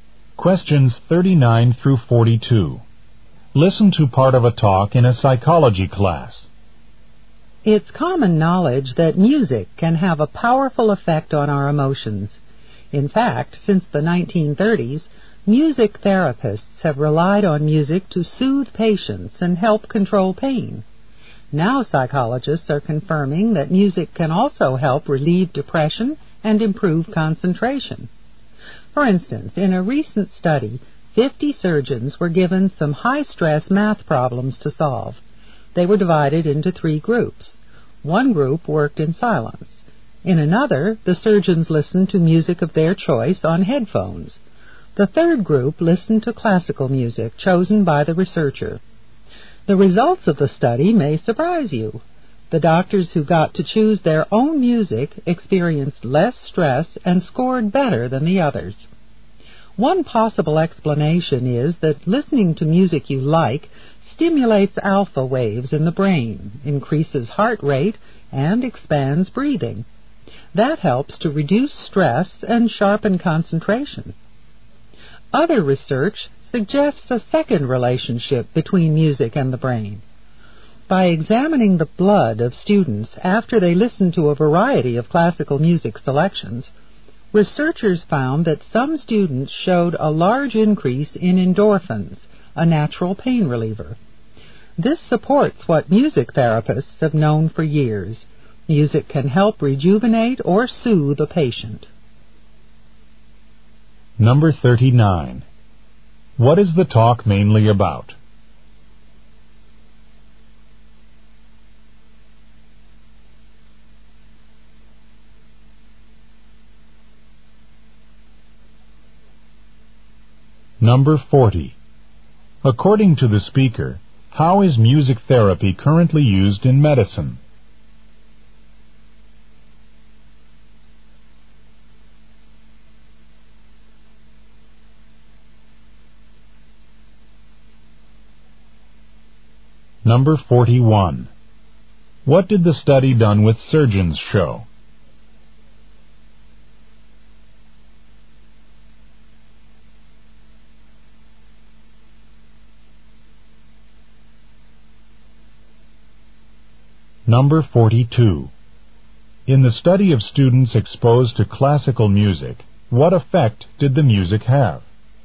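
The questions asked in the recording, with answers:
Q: What is the talk mainly about?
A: The effects of music on the mind and body.

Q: According to the speaker, how is music therapy currently used in medicine?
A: To soothe patients and help control pain.

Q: What did the study done with surgeons show?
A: Surgeons who chose their own music had less stress and scored better.

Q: In the study of students exposed to classical music, what effect did the music have?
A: Some students' endorphins increased greatly.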